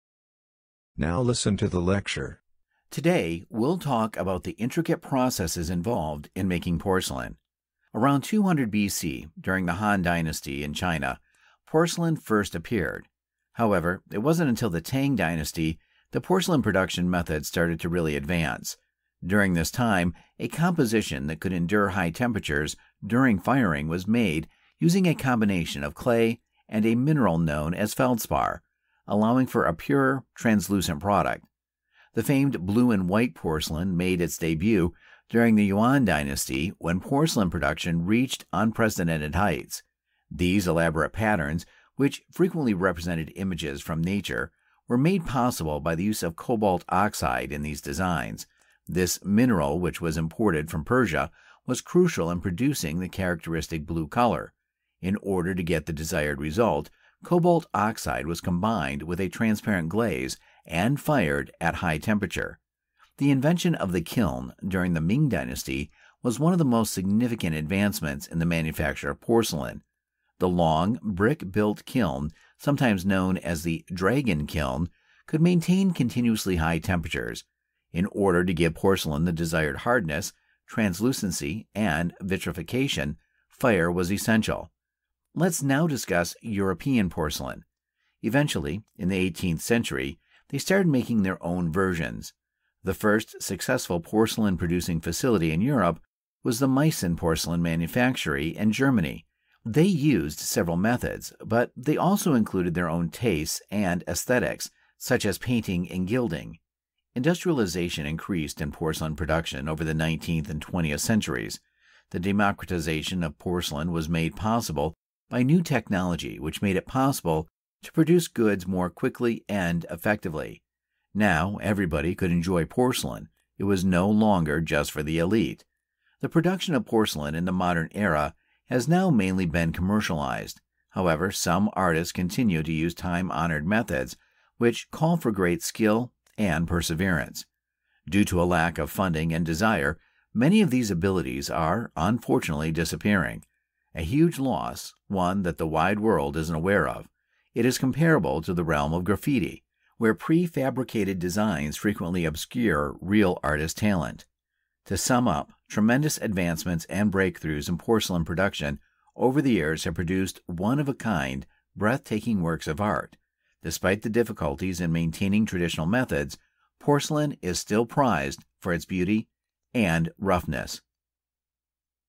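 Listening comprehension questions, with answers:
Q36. The blue color in blue-and-white porcelain is derived from which material?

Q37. How does the professor feel about the loss of traditional porcelain-making techniques?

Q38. How did the production of porcelain change during the 19th and 20th centuries?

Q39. Which European factory was the first to successfully produce porcelain?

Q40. Why does the professor mention the world of graffiti?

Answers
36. Cobalt oxide
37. She considers it a huge loss.
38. It became industrialized, so porcelain became available to everyone.
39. The Meissen Porcelain Manufactory
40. To compare it with porcelain making: in both, prefabricated designs hide real artistic talent.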